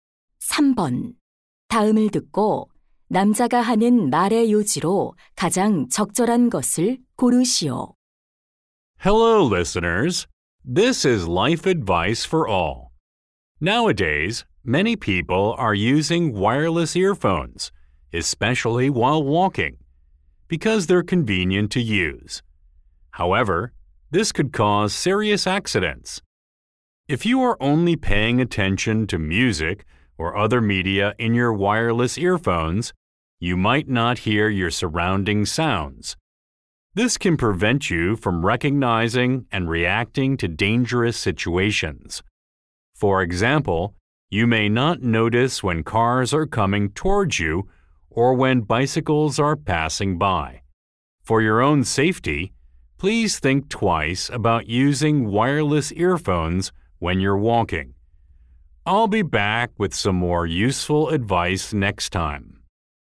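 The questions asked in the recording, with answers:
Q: 다음을 듣고 남자가 하는 말의 요지로 가장 적절한 것을 고르시오.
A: 걸을 때 무선 이어폰 사용은 사고를 유발할 수 있어 위험하다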